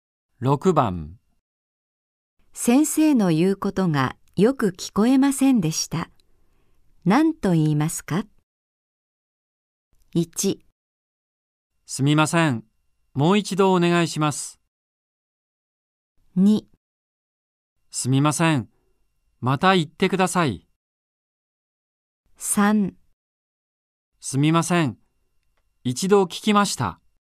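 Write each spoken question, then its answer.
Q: 先生の言うことがよく聞こえませんでした。何と言いますか。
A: 1: すみません。もう一度お願いします。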